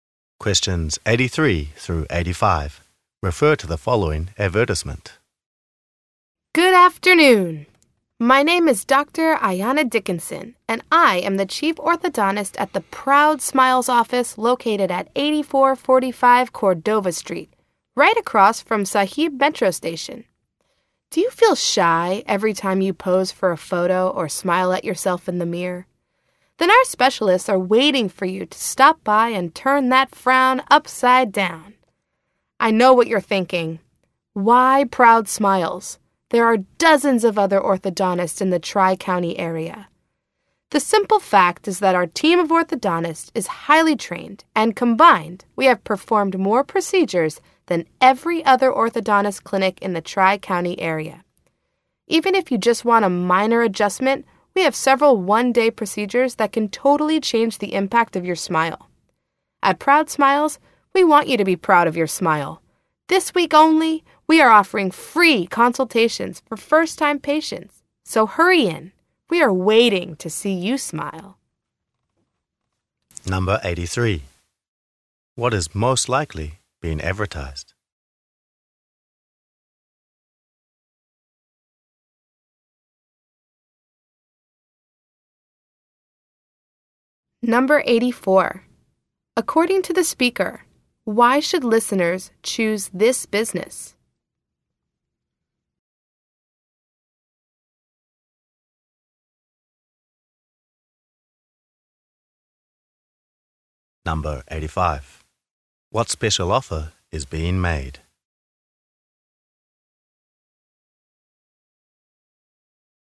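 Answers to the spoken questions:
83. An orthodontist clinic
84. Its team is highly trained and has performed more procedures than other clinics
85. Free consultations for first-time patients this week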